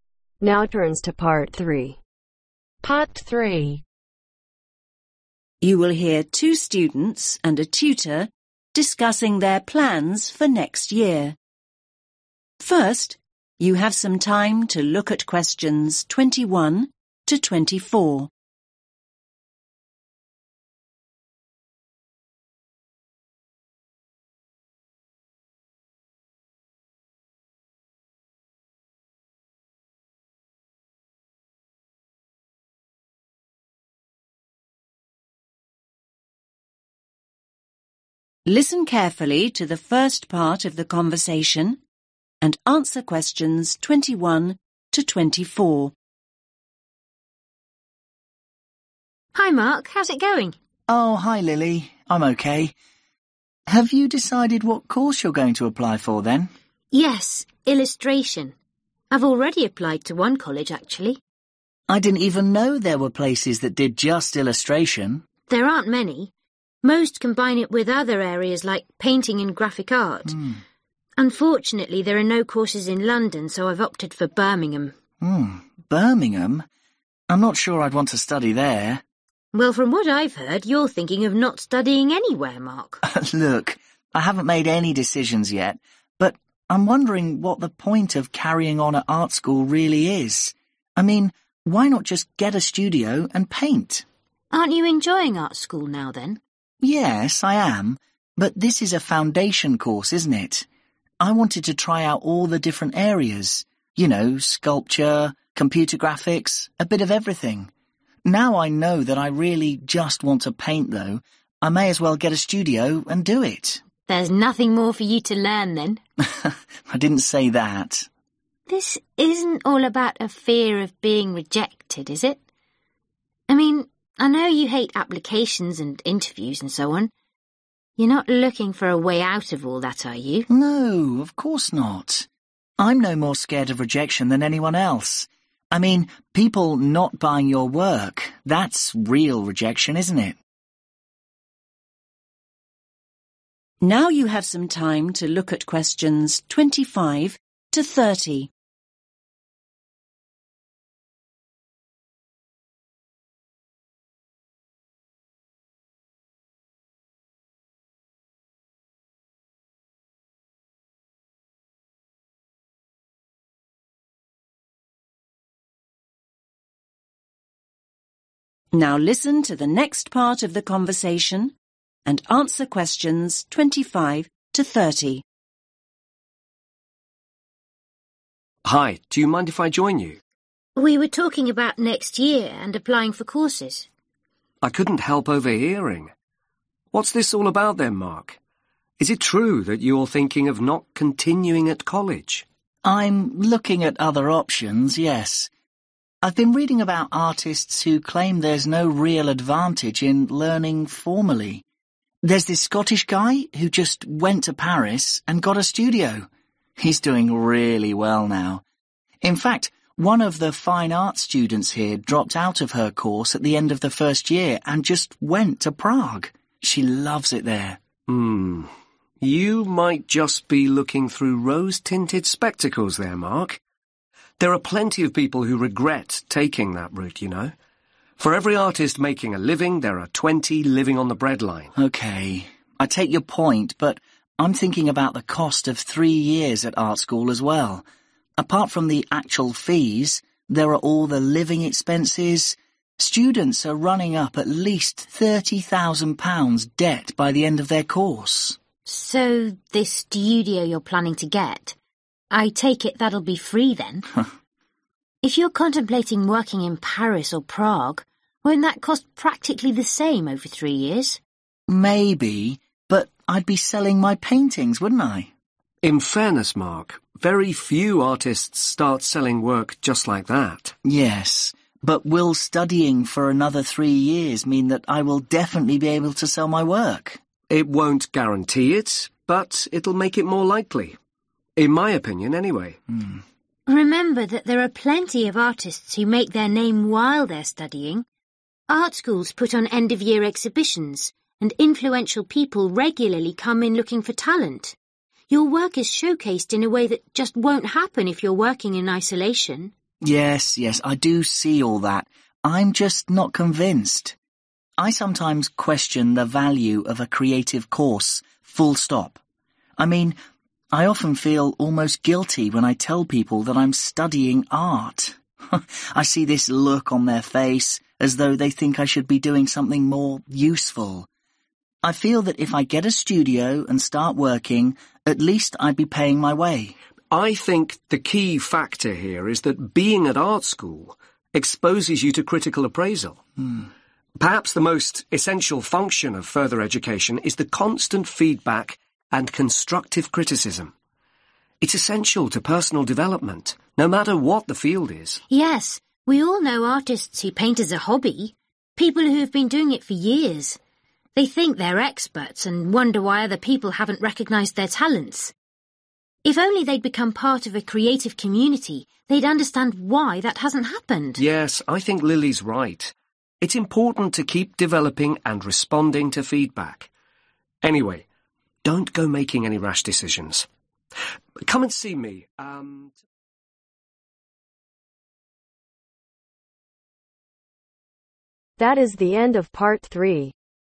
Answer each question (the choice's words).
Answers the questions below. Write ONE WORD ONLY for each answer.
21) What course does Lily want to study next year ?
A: Illustration

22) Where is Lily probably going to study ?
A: Birmingham

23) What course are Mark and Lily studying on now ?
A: Foundation

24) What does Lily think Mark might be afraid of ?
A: Rejection

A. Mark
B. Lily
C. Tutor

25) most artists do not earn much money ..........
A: Tutor

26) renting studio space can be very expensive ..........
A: Lily

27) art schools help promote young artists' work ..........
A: Tutor

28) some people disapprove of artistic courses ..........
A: Mark

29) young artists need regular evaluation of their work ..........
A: Tutor

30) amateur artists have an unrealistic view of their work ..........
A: Lily